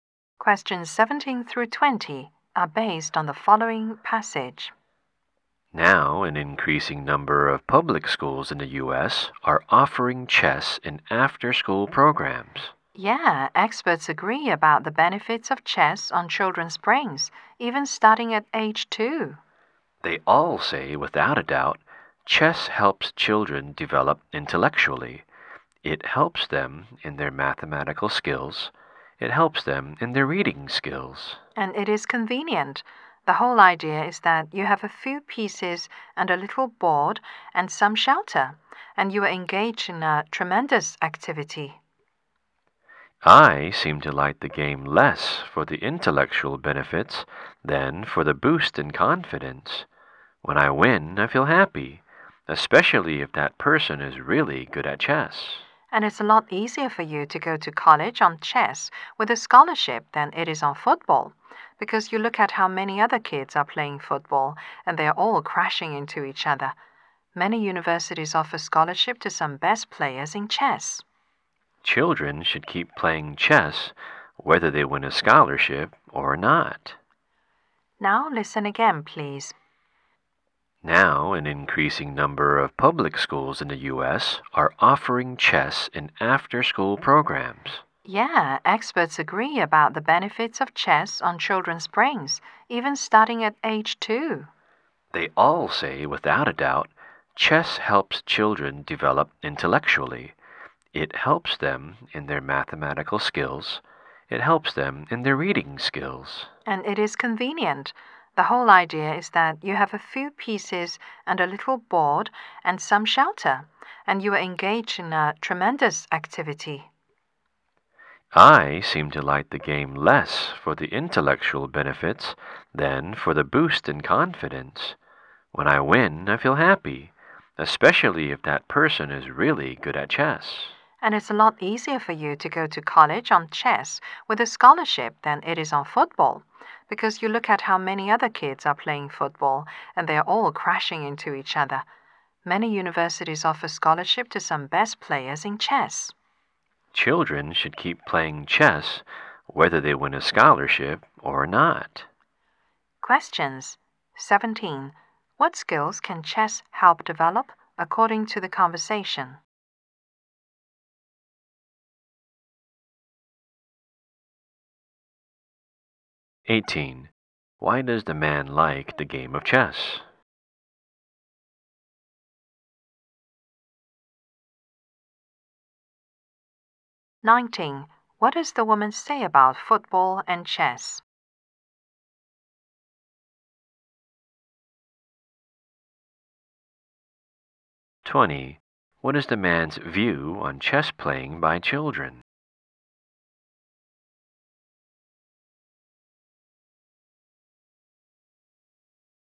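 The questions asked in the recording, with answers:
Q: What skills can chess help develop according to the conversation?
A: Math and reading skills

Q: Why does the man like the game of chess?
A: It boosts his confidence

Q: What does the woman say about football and chess?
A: It's easier to get a college scholarship with chess than with football

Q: What is the man's view on chess playing by children?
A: Children should keep playing chess whether or not they win a scholarship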